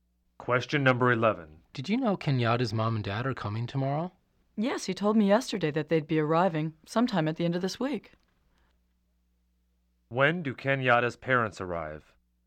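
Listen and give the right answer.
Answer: At the end of this week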